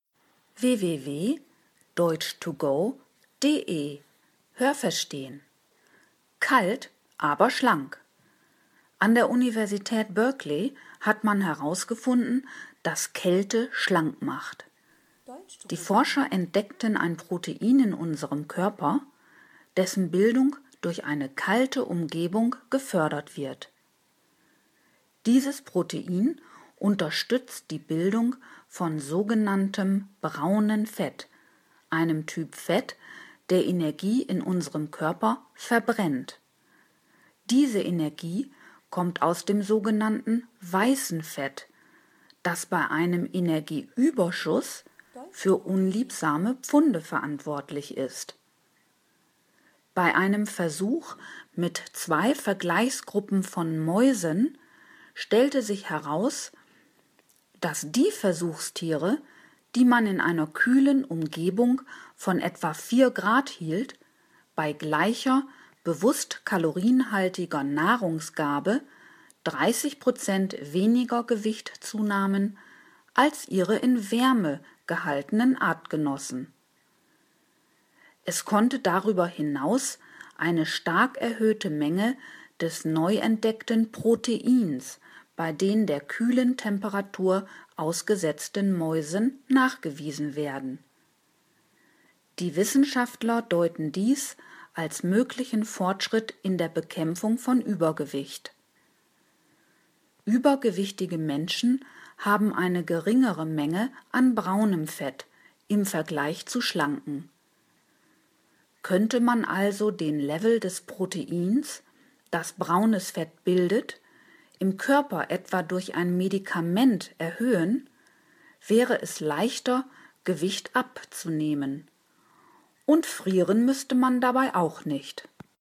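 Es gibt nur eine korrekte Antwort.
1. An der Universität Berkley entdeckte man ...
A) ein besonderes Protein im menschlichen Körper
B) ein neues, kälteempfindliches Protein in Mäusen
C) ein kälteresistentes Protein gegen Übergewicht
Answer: A) ein besonderes Protein im menschlichen Körper

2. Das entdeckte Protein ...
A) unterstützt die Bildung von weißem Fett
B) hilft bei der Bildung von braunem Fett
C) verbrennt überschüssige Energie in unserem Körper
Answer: B) hilft bei der Bildung von braunem Fett

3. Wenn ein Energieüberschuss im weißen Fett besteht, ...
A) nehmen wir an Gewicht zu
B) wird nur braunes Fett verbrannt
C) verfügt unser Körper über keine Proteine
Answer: A) nehmen wir an Gewicht zu

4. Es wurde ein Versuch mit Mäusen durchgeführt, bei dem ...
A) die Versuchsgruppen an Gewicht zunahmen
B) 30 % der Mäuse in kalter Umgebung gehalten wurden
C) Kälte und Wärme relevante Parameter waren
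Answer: C) Kälte und Wärme relevante Parameter waren

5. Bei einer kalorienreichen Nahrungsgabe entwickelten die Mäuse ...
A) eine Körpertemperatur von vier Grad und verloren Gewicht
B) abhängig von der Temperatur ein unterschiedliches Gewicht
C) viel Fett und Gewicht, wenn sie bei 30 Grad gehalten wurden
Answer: B) abhängig von der Temperatur ein unterschiedliches Gewicht

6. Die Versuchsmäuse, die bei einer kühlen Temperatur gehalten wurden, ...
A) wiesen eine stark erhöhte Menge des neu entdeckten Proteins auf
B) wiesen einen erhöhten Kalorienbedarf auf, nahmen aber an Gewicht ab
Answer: A) wiesen eine stark erhöhte Menge des neu entdeckten Proteins auf

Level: C2

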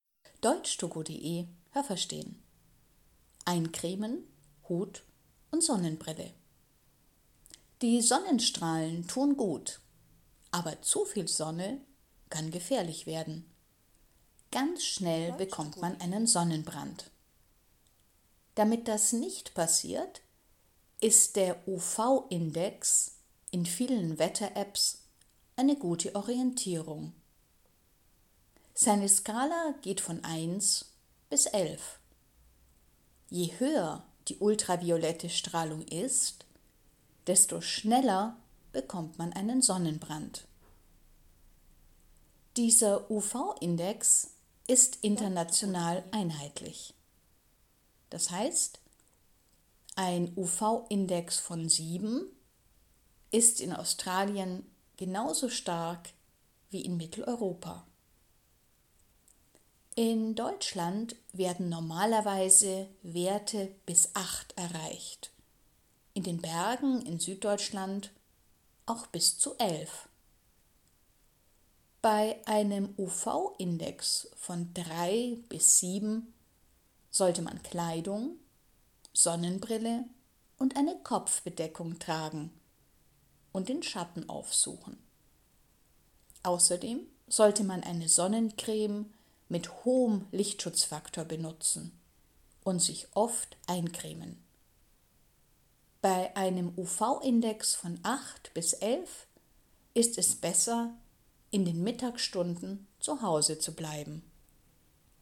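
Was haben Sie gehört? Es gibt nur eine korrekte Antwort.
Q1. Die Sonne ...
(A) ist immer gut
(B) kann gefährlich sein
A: (B) kann gefährlich sein

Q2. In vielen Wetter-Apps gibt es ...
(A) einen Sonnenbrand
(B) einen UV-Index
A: (B) einen UV-Index

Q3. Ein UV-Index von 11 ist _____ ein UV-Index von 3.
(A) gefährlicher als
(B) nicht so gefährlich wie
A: (A) gefährlicher als

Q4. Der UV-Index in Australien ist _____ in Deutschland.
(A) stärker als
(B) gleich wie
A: (B) gleich wie

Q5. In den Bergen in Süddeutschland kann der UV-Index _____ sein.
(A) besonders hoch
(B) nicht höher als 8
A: (A) besonders hoch

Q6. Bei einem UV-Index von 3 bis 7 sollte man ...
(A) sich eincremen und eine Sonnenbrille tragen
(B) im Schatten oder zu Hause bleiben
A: (A) sich eincremen und eine Sonnenbrille tragen

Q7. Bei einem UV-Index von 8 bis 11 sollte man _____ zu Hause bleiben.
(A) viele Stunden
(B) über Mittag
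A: (B) über Mittag

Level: A2

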